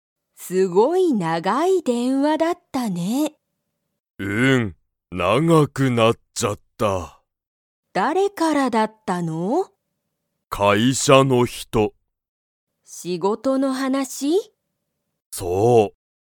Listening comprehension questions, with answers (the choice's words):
父ちちは、____と電話でんわした。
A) 友達ともだち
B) 学校がっこうの人ひと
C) 先生せんせい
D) 会社かいしゃの人ひと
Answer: 会社かいしゃの人ひと